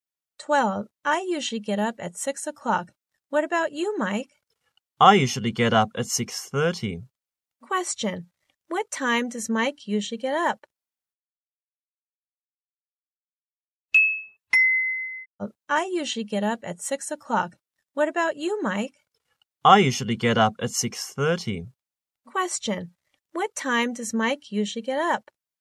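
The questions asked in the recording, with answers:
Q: What time does Mike usually get up?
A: At 6:30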